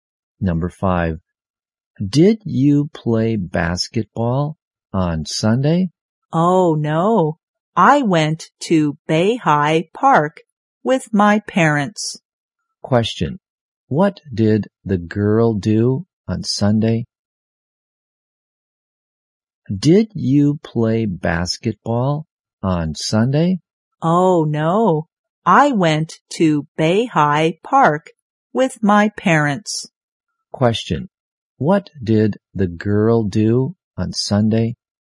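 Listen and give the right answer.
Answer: She went to a park with her parents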